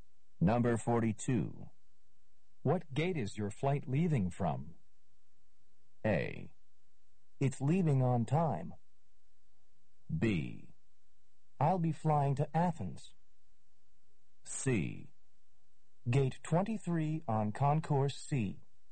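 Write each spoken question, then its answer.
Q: What gate is your flight leaving from?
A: C: Gate 23 on Concourse C.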